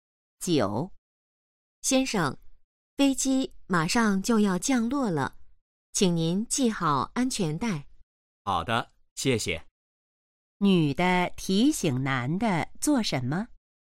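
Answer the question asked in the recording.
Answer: 系好安全带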